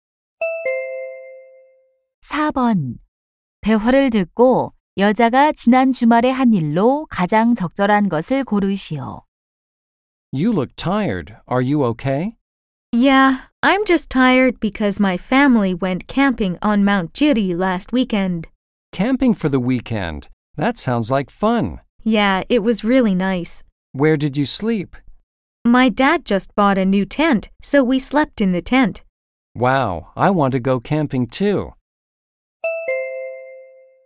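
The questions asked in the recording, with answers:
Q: 대화를 듣고 여자가 지난 주말에 한 일로 가장 적절한 것을 고르시오.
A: 가족과 지리산에서 캠핑하기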